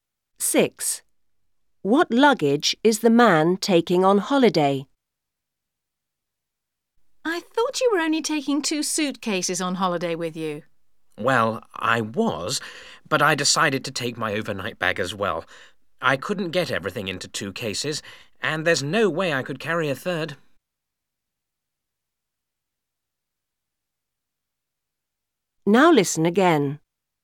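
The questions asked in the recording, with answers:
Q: What luggage is the man taking on holiday?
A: Two suitcases and an overnight bag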